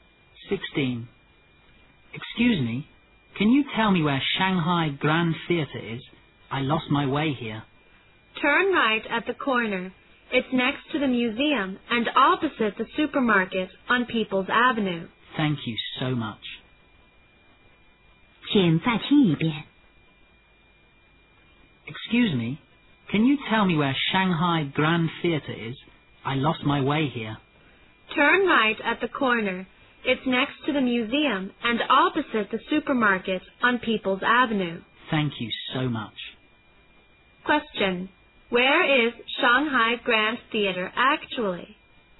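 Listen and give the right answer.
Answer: Next to the museum and opposite the supermarket on People's Avenue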